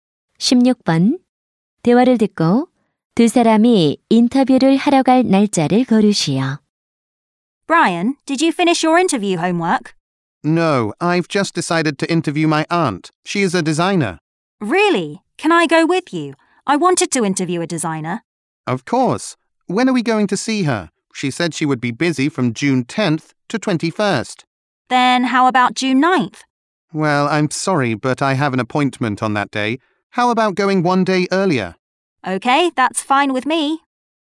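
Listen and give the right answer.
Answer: 6월 8일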